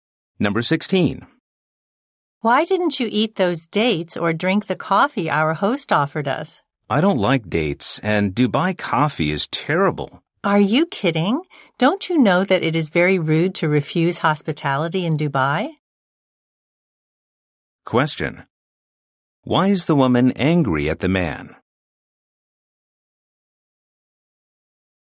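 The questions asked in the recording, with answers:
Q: Why is the woman angry at the man?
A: He refused the host's hospitality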